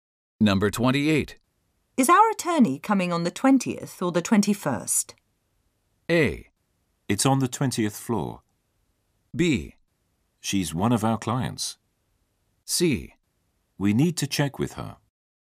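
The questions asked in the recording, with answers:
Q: Is our attorney coming on the 20th or the 21st?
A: C: We need to check with her.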